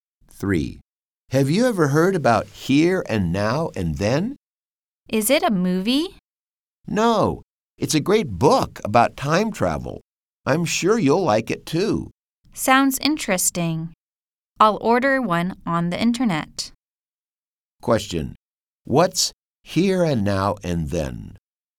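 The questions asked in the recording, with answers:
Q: What's Here and Now and Then?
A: A book about time travel.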